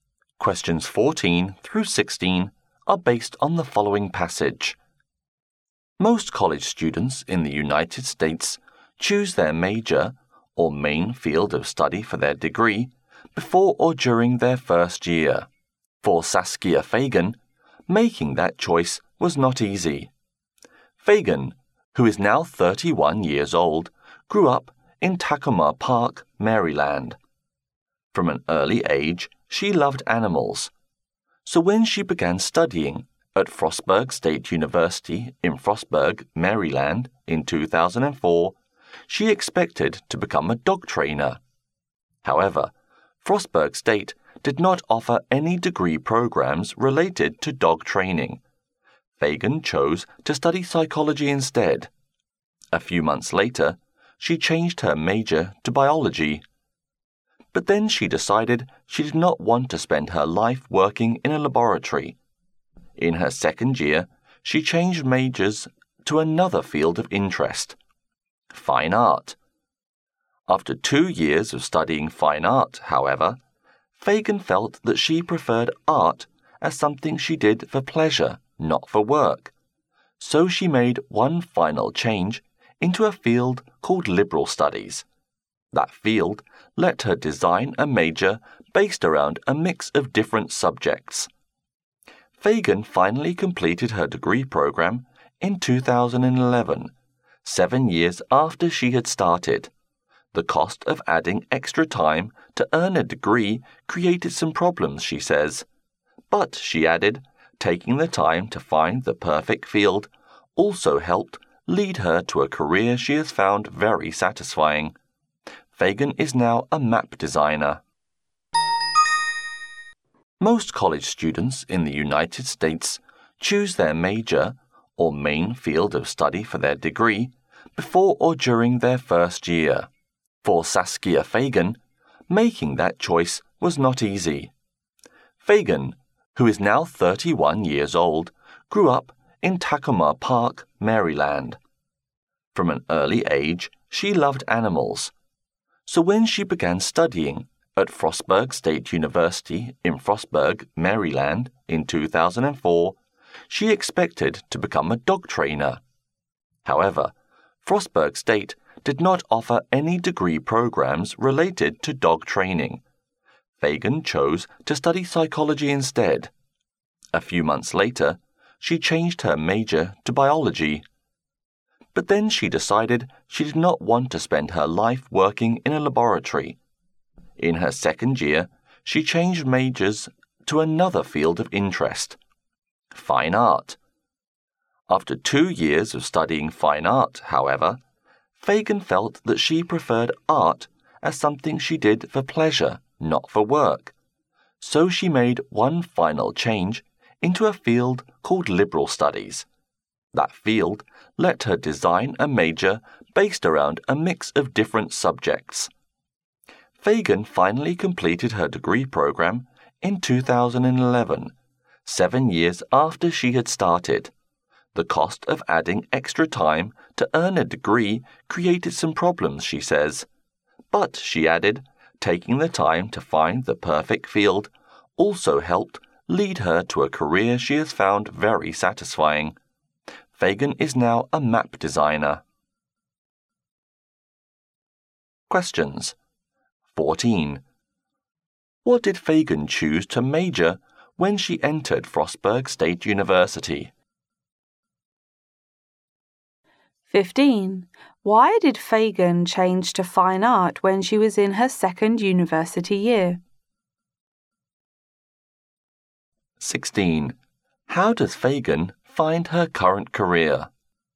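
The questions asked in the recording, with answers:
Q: What did Fagan choose to major when she entered Frostburg State University?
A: Psychology

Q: Why did Fagan change to fine art when she was in her second university year?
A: She didn't want to spend her life working in a laboratory

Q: How does Fagan find her current career?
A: Very satisfying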